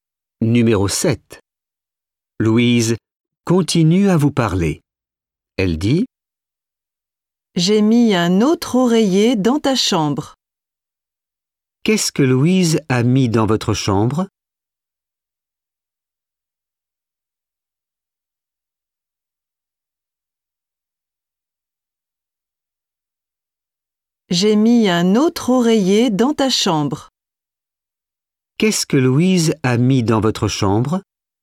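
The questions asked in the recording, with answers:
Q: Qu'est-ce que Louise a mis dans votre chambre?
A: un autre oreiller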